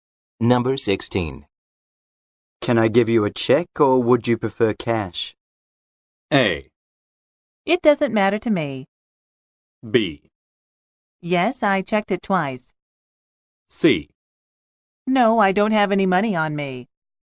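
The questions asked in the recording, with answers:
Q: Can I give you a check or would you prefer cash?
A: A: It doesn't matter to me.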